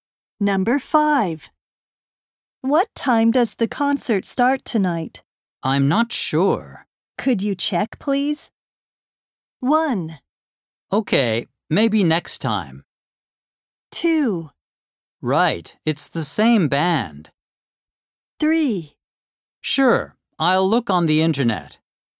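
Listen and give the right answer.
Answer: 3: Sure, I'll look on the internet.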